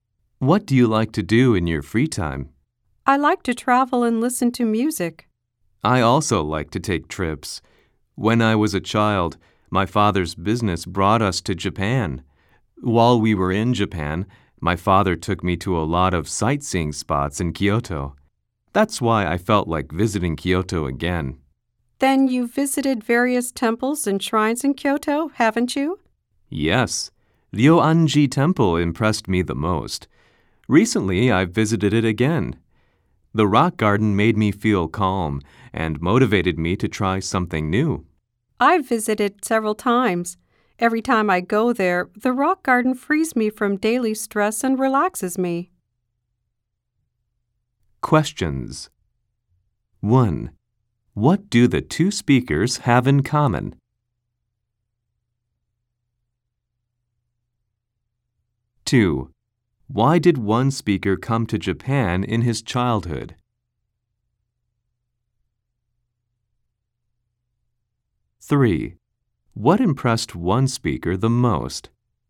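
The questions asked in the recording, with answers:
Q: Why did one speaker come to Japan in his childhood?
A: Because of his father's business.

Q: What impressed one speaker the most?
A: The Ryoanji Temple (its rock garden).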